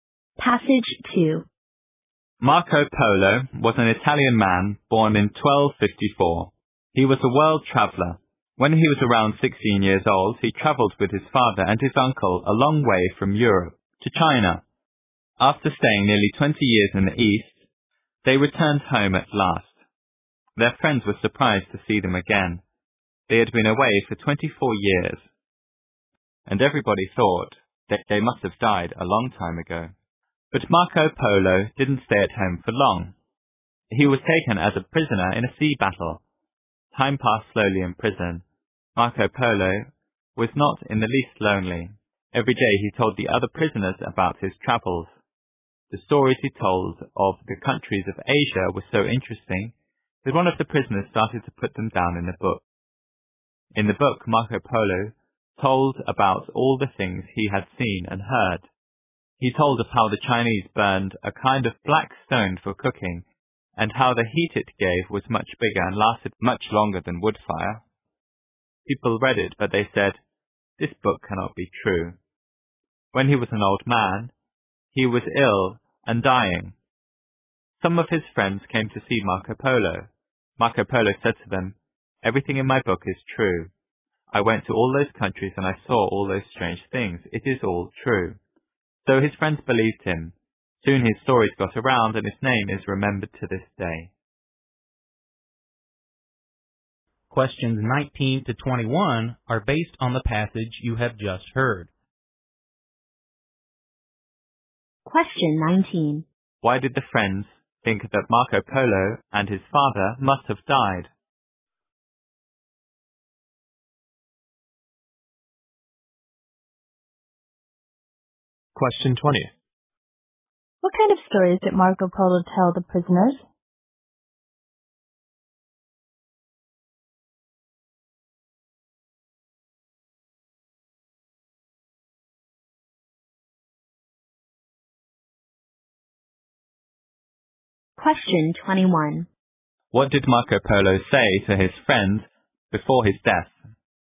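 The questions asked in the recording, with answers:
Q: Why did the friends think that Marco Polo and his father must have died?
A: They had been away for 24 years.

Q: What kind of stories did Marco Polo tell the prisoners?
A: Stories of his travels in the countries of Asia.

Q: What did Marco Polo say to his friends before his death?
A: Everything in his book is true.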